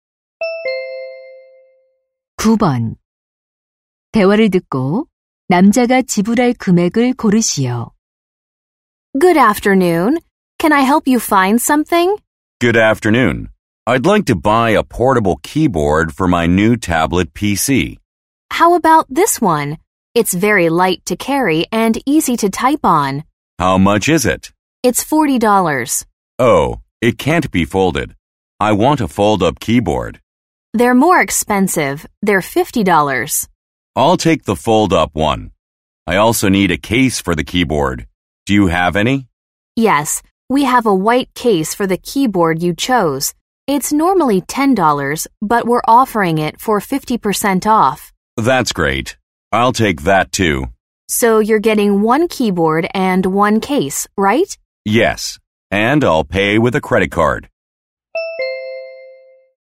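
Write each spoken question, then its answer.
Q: 대화를 듣고 남자가 지불할 금액을 고르시오.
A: $55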